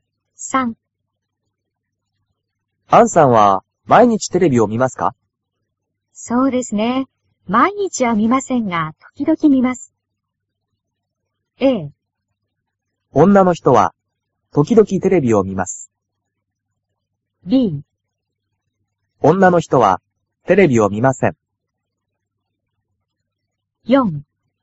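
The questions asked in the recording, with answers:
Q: 女の人は時々テレビを見ます。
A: A: 女の人は時々テレビを見ます。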